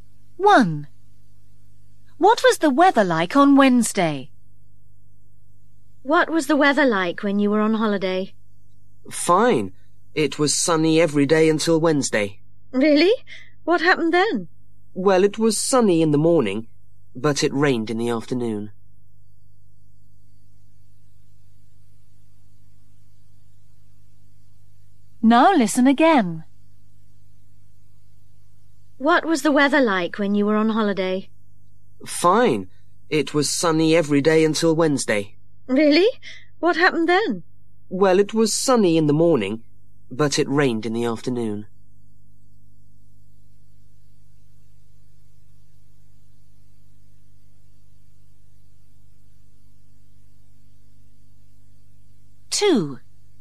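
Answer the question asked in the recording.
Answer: Sunny in the morning, rainy in the afternoon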